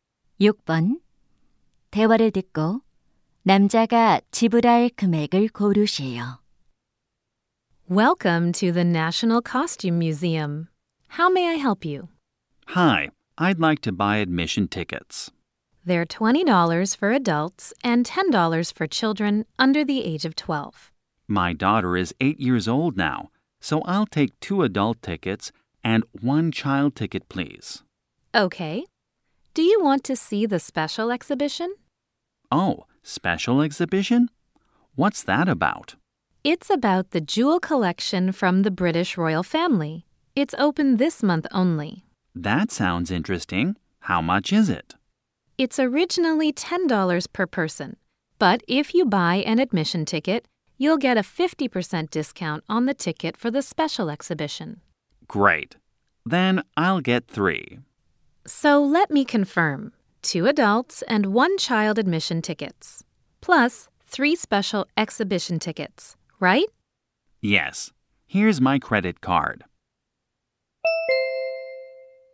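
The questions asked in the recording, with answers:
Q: 대화를 듣고 남자가 지불할 금액을 고르시오.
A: $65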